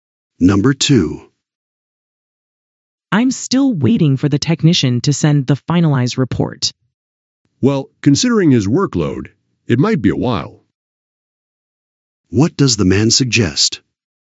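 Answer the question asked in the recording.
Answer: The report may take a long time because the technician is very busy.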